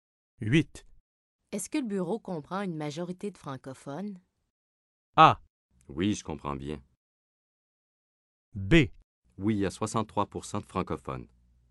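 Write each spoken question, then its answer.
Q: Est-ce que le bureau comprend une majorité de francophones?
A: B: Oui, il y a 63 % de francophones.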